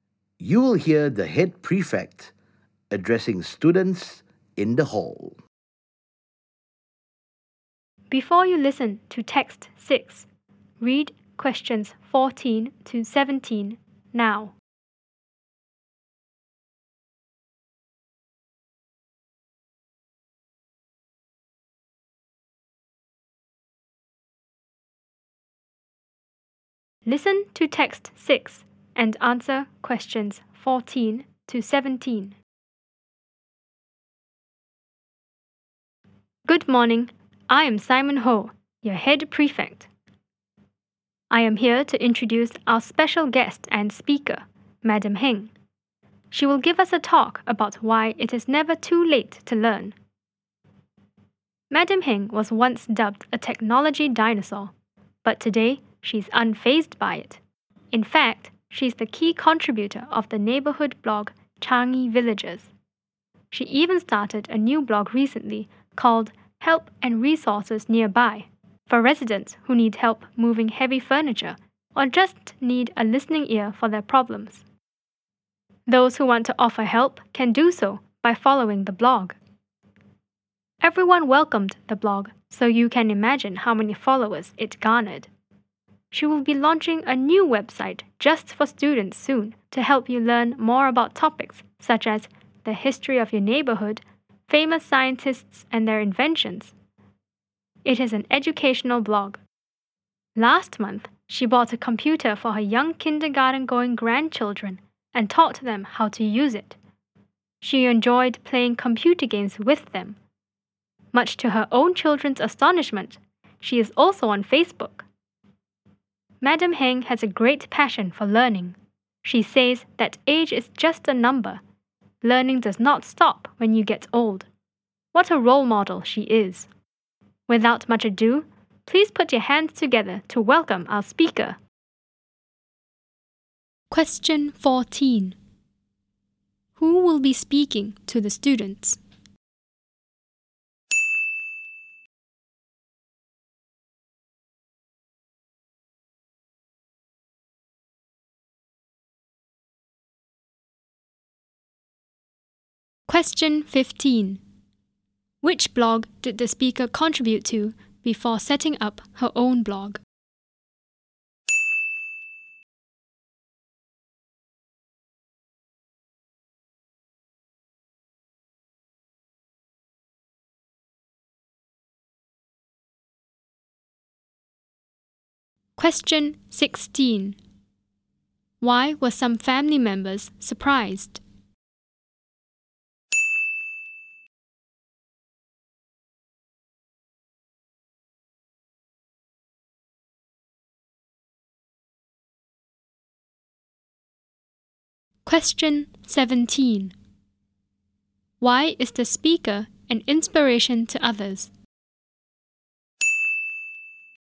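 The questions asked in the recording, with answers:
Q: Who will be speaking to the students?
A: Madam Heng

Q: Which blog did the speaker contribute to before setting up her own blog?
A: Changi Villages

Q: Why were some family members surprised?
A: She is on Facebook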